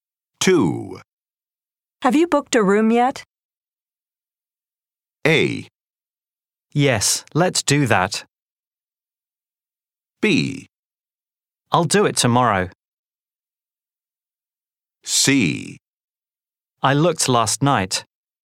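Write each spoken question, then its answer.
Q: Have you booked a room yet?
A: B: I'll do it tomorrow.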